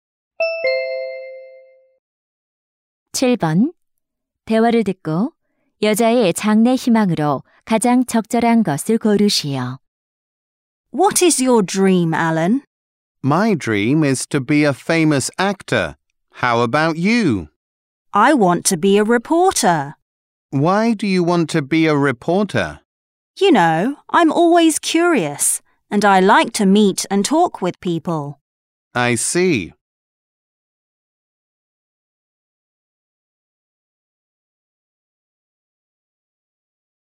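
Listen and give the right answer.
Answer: 기자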